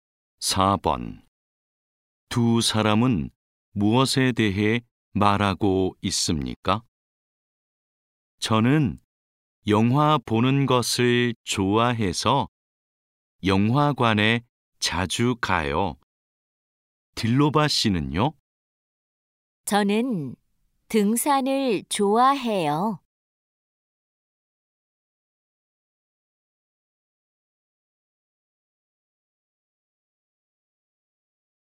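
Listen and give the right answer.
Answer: 취미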